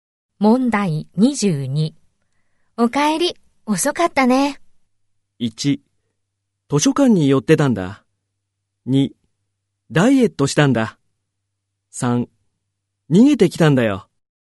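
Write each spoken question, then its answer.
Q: お帰り、遅かったね。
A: 1: 図書館に寄ってたんだ。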